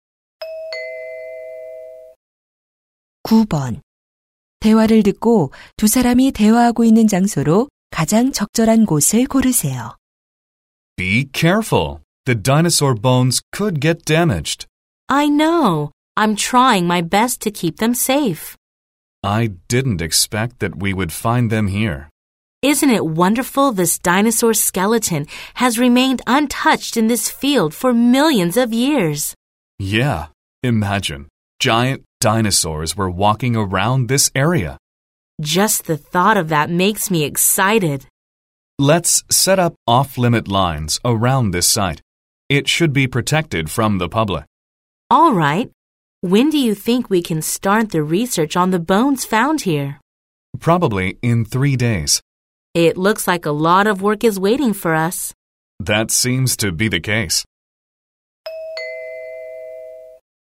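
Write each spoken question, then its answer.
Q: 대화를 듣고 두 사람이 대화하고 있는 장소로 가장 적절한 곳을 고르세요.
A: 공룡 화석 발굴 현장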